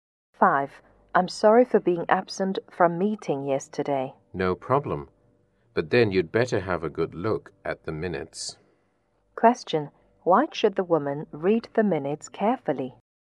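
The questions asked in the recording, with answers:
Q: Why should the woman read the minutes carefully?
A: Because she was absent from the meeting yesterday.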